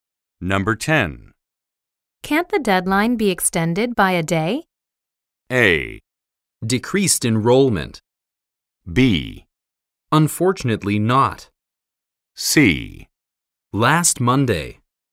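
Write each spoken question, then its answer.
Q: Can't the deadline be extended by a day?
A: B: Unfortunately not.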